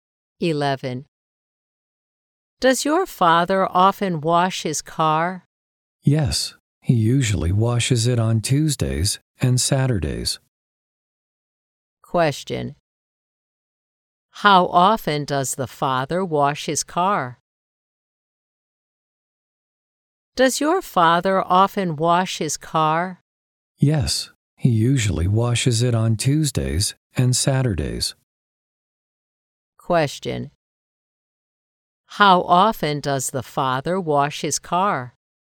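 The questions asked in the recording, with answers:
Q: How often does the father wash his car?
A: Twice a week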